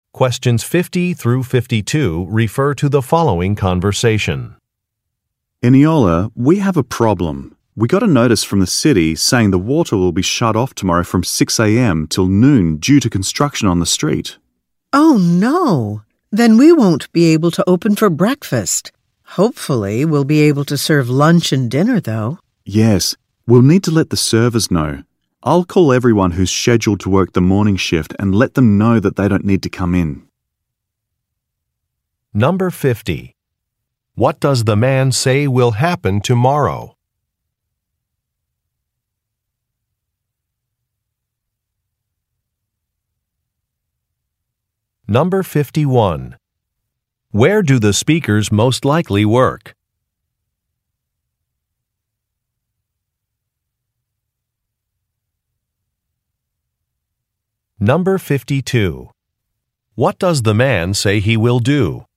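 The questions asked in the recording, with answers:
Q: What does the man say will happen tomorrow?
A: The water will be shut off from 6 a.m. till noon for street construction.

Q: Where do the speakers most likely work?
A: At a restaurant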